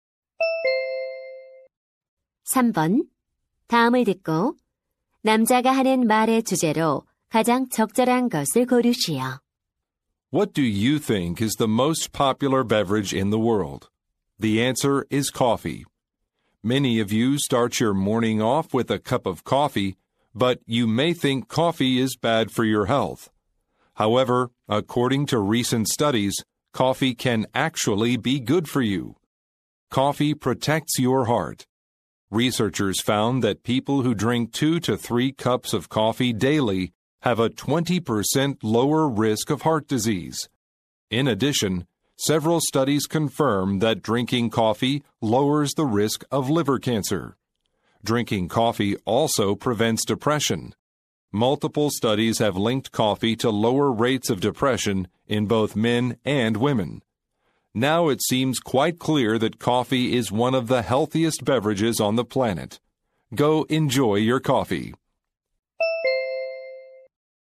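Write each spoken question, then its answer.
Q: 다음을 듣고 남자가 하는 말의 주제로 가장 적절한 것을 고르시오.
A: 커피가 건강에 주는 이점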